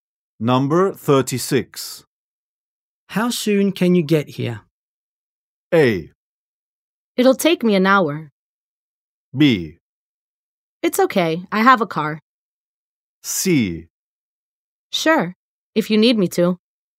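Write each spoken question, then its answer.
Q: How soon can you get here?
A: A: It'll take me an hour.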